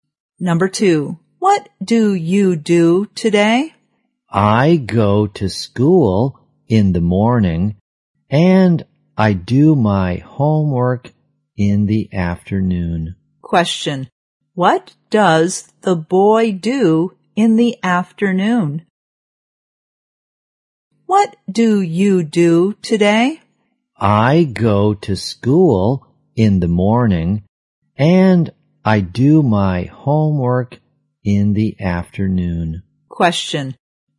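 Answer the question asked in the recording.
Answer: He does his homework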